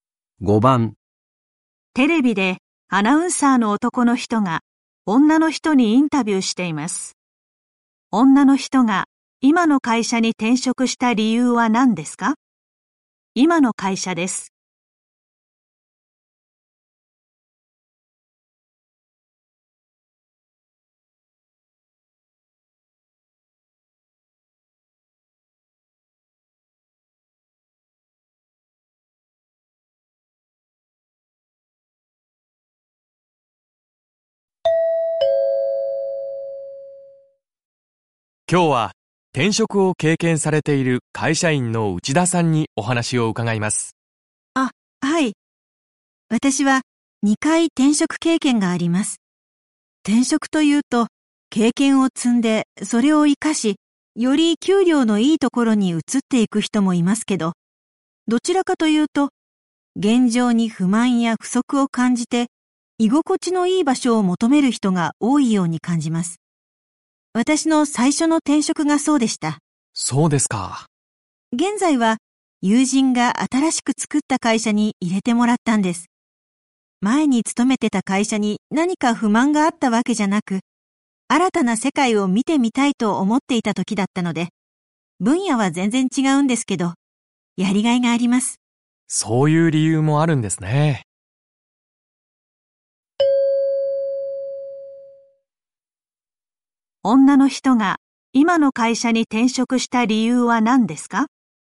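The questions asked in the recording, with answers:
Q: 女の人が今の会社に転職した理由は何ですか?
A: 新たな世界を見てみたいと思ったから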